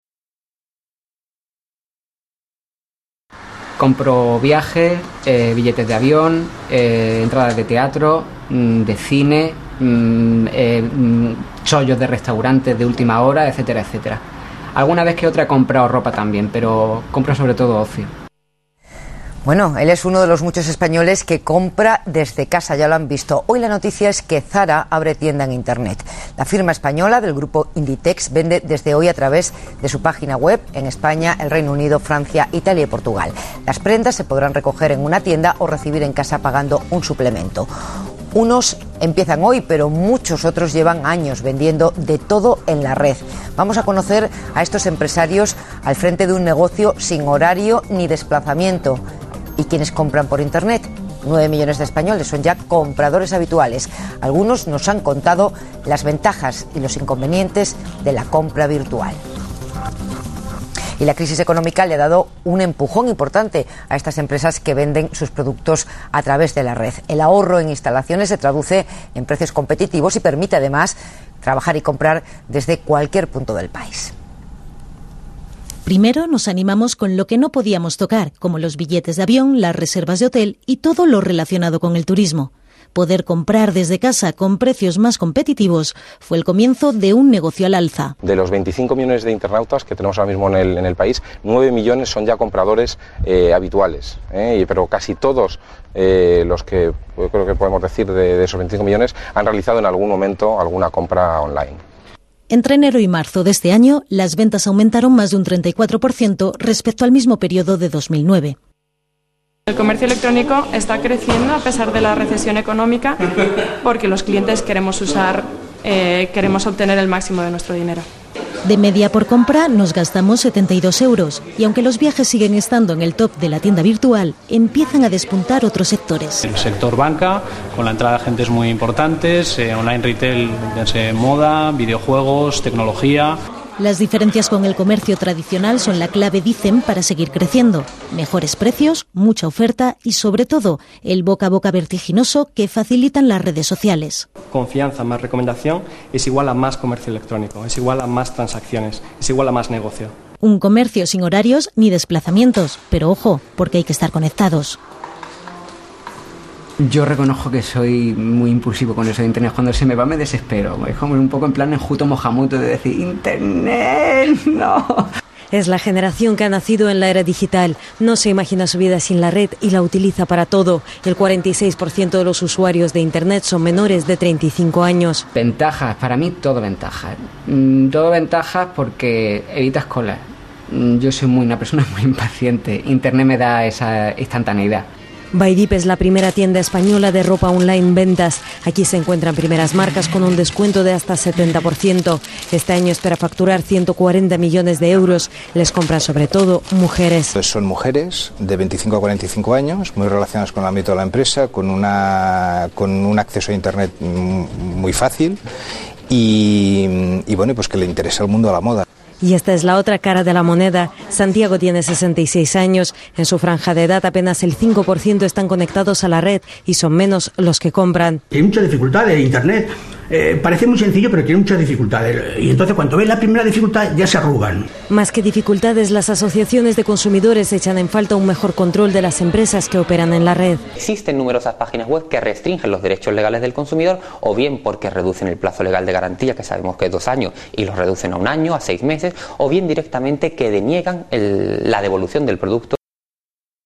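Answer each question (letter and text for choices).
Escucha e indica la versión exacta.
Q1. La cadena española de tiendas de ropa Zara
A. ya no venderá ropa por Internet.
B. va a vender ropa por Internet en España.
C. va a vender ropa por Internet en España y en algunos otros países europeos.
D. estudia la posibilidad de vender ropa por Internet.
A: C. va a vender ropa por Internet en España y en algunos otros países europeos.

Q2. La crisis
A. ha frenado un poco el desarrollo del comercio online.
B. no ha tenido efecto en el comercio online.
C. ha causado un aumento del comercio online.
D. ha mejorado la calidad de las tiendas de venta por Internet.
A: C. ha causado un aumento del comercio online.

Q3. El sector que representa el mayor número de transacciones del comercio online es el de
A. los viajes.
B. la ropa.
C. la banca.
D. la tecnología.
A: A. los viajes.

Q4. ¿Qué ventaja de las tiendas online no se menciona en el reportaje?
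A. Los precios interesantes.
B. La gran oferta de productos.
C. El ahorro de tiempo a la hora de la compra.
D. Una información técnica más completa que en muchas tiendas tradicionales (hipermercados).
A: D. Una información técnica más completa que en muchas tiendas tradicionales (hipermercados).

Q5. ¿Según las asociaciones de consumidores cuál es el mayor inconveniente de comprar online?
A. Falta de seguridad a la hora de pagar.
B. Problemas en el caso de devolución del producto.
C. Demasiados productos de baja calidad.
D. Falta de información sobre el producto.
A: B. Problemas en el caso de devolución del producto.

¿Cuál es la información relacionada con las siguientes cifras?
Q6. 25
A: Hay 25 millones de internautas en España.

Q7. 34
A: Entre enero y marzo las ventas aumentaron más de un 34% respecto a 2009.

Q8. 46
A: El 46% de los usuarios de Internet son menores de 35 años.

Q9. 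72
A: De media se gastan 72 euros por compra.

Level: 中高级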